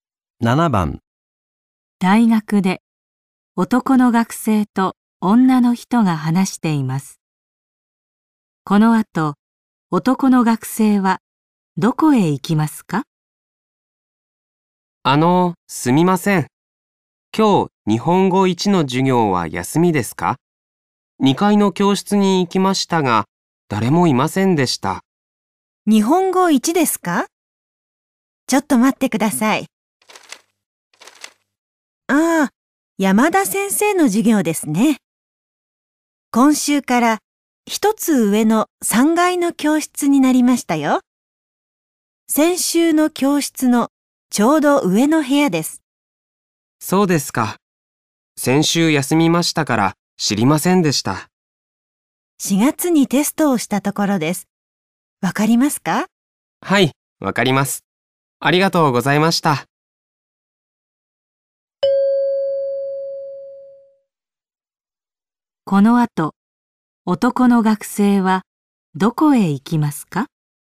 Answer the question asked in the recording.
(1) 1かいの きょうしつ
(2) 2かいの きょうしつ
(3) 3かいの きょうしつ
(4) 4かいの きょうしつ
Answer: (3) 3かいの きょうしつ

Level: N5 Listening · Test 3